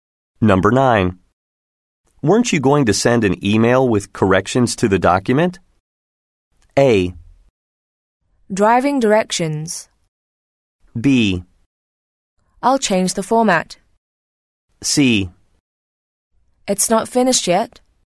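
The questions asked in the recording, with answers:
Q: Weren't you going to send an email with corrections to the document?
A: C: It's not finished yet.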